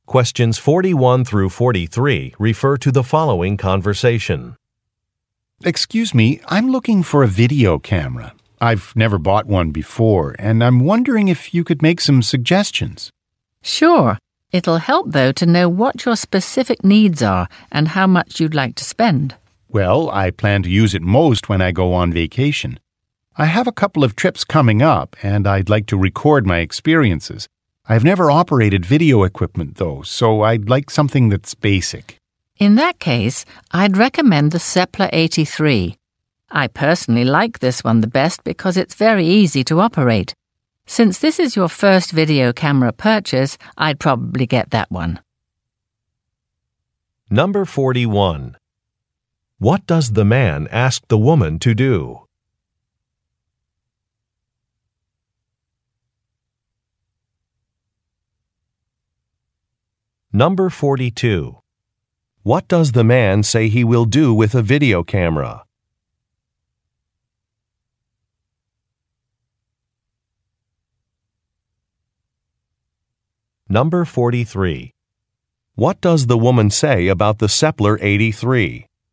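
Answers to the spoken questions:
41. Suggest a video camera to buy
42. Record his experiences on vacation trips
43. It is very easy to operate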